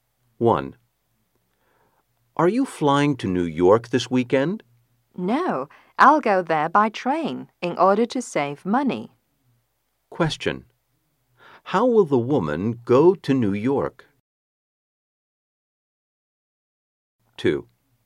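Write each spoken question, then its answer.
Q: How will the woman go to New York?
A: By train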